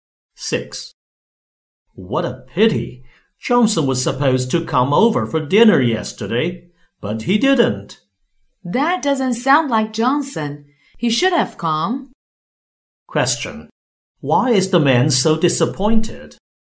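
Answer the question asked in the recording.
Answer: Johnson didn't come to dinner as expected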